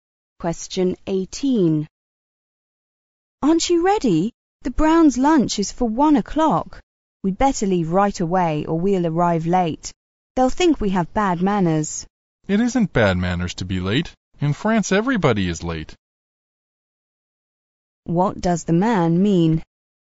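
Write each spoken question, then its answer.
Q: What does the man mean?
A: Being late isn't bad manners; there's no need to hurry.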